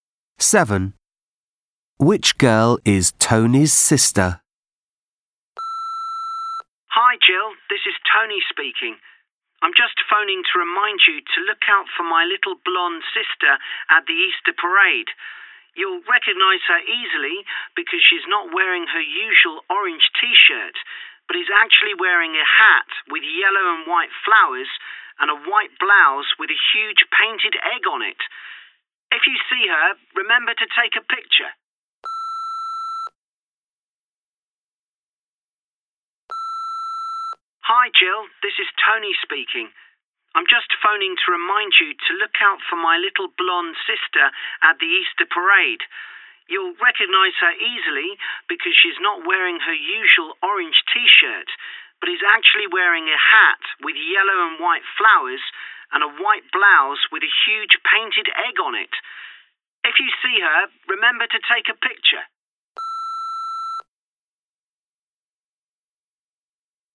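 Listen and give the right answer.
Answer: The little blonde girl in a hat with yellow and white flowers and a white blouse with a painted egg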